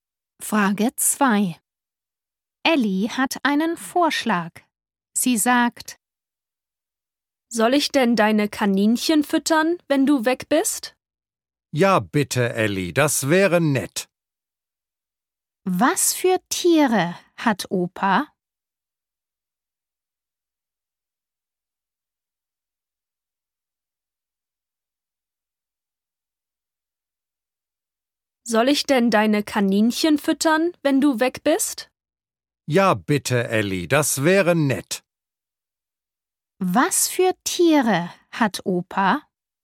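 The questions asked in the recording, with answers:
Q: Was für Tiere hat Opa?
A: Kaninchen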